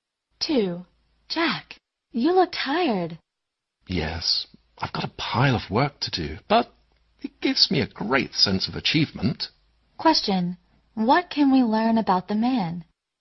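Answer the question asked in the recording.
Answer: He is very busy but finds his work satisfying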